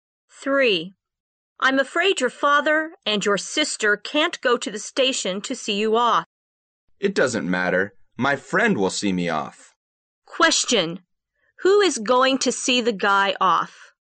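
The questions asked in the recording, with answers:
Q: Who is going to see the guy off?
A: His friend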